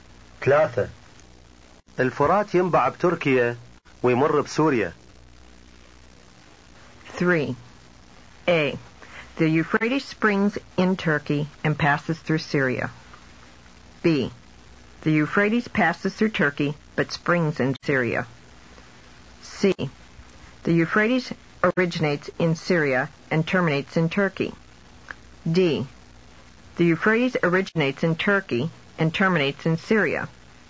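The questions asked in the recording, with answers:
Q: الفرات ينبع بتركيا ويمر بسوريا.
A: A: The Euphrates springs in Turkey and passes through Syria.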